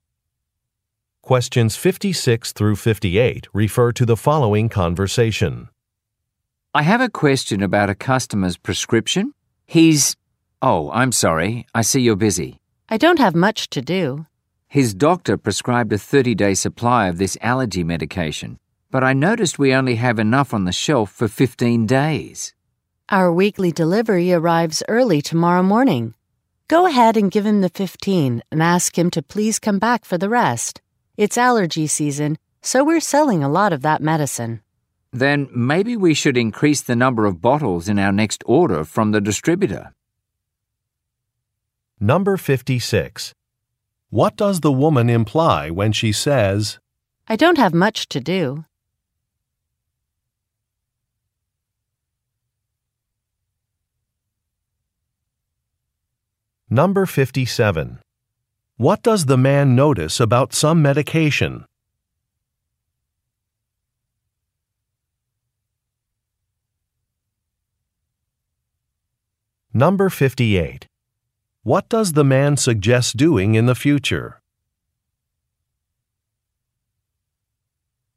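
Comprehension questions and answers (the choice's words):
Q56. What does the woman imply when she says, "I don't have much to do"?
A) She has time to help.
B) She plans to leave work early.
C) Her computer is not working.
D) She has not received an assignment.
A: She has time to help.

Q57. What does the man notice about some medication?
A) It needs to be refrigerated.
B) It has expired.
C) The dosage has changed.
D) The supply is limited.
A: The supply is limited.

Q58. What does the man suggest doing in the future?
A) Installing some shelves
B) Confirming with a doctor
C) Increasing an order amount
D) Recommending a different medication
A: Increasing an order amount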